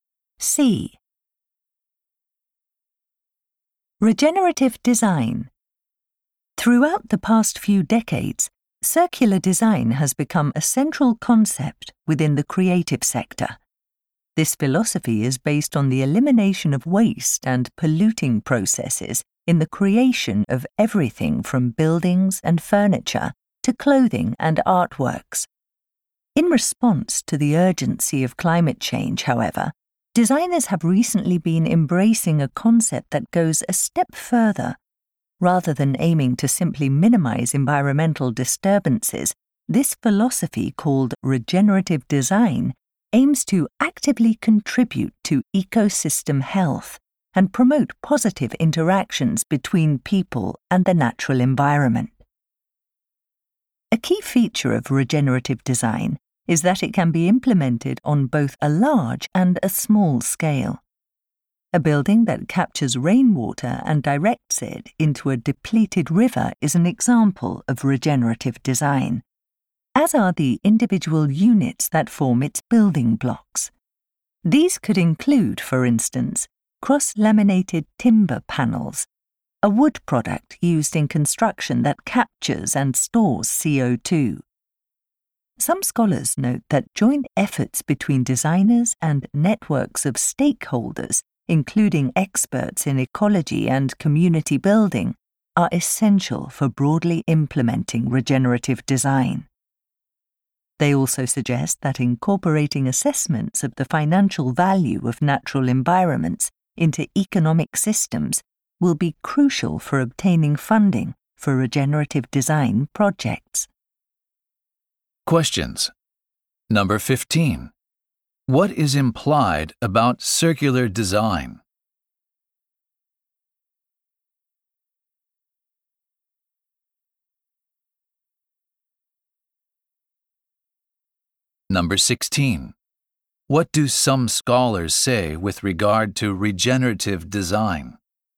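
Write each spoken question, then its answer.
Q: What is implied about circular design?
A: It does not go far enough; it only minimizes harm rather than actively improving ecosystems.

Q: What do some scholars say with regard to regenerative design?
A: It requires cooperation between designers and stakeholders, and valuing nature economically to get funding.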